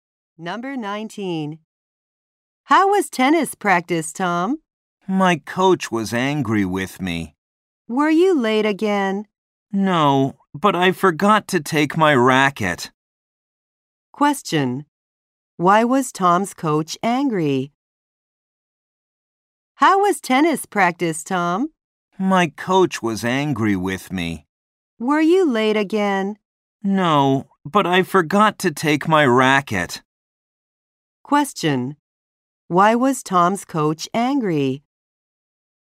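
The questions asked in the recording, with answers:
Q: Why was Tom's coach angry?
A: Tom forgot to take his racket.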